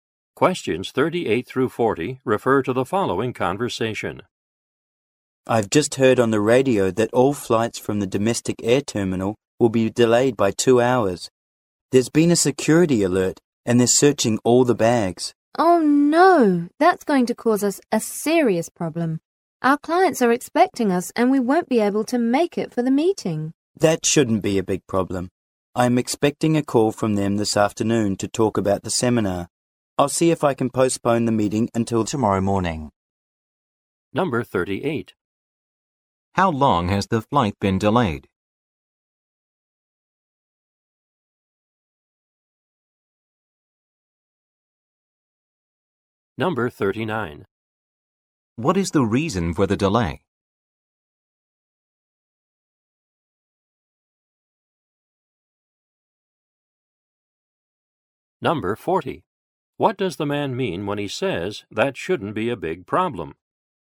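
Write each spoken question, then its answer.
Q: How long has the flight been delayed?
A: 2 hours

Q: What is the reason for the delay?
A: A security alert

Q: What does the man mean when he says that shouldn't be a big problem?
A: He can postpone the meeting until tomorrow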